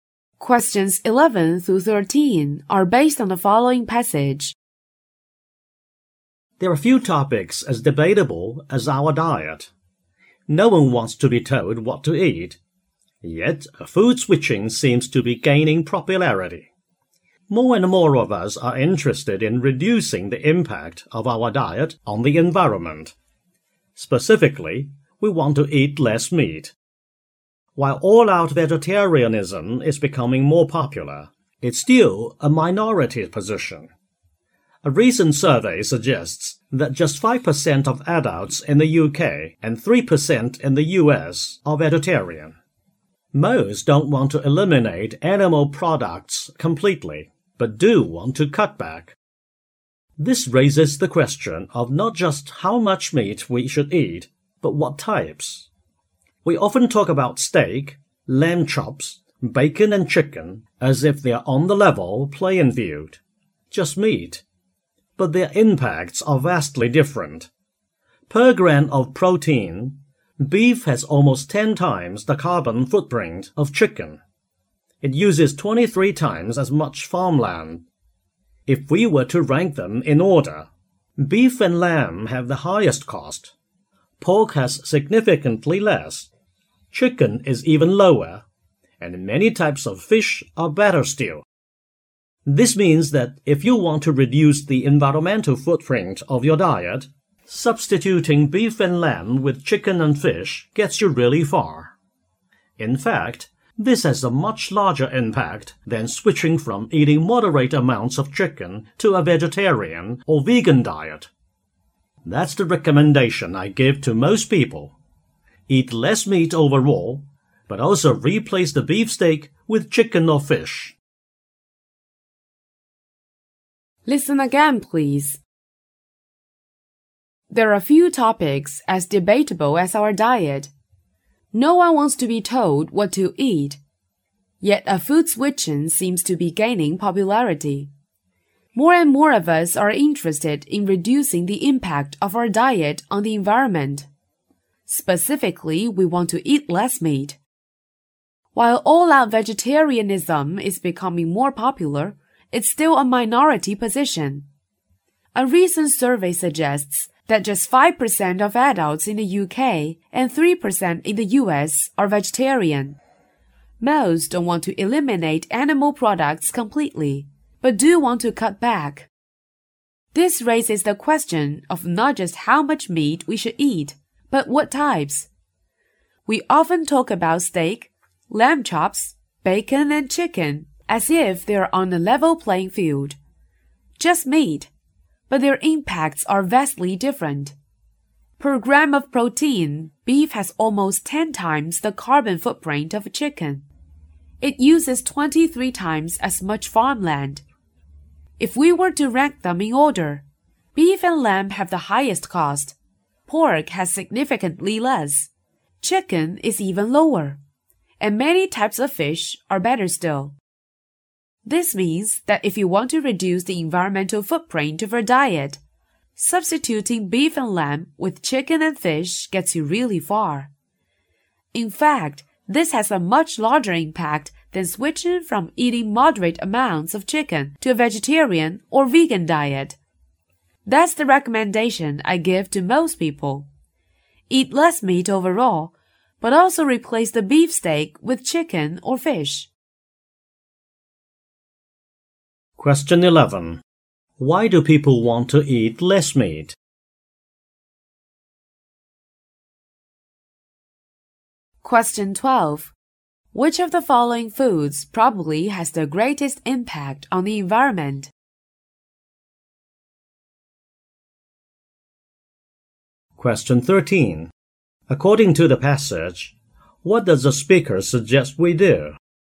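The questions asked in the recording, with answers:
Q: Why do people want to eat less meat?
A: To reduce the impact of their diet on the environment

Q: Which of the following foods probably has the greatest impact on the environment?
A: Beef

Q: According to the passage, what does the speaker suggest we do?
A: Eat less meat and replace beef with chicken or fish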